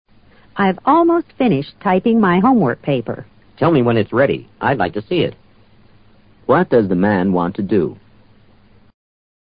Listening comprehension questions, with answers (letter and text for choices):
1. What does the man want to do?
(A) Borrow the typewriter.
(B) Visit the woman.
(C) Go home soon.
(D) Read the woman's paper.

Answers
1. (D) Read the woman's paper.

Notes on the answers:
finish typing: 用打字机打完。 homework paper: 论文作业。I'd like to see it (paper) = I'd like to read it.